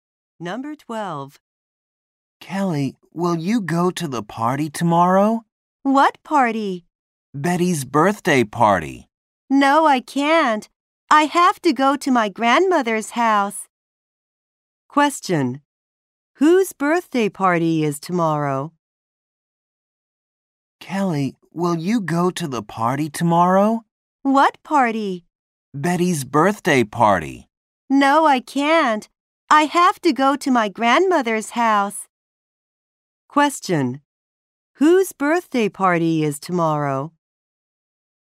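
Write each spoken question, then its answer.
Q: Whose birthday party is tomorrow?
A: Betty's.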